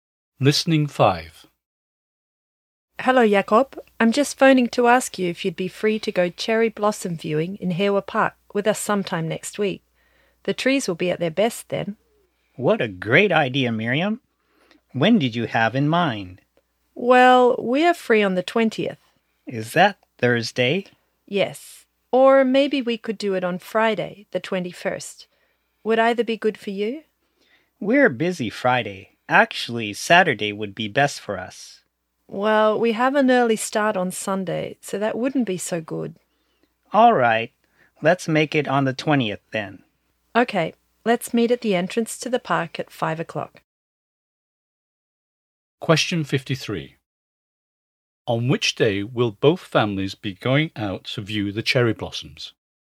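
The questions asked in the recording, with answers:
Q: On which day will both families be going out to view the cherry blossoms?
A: Thursday, the 20th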